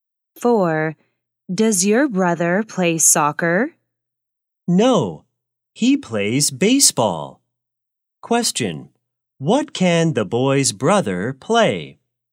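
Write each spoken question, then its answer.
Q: What can the boy's brother play?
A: Baseball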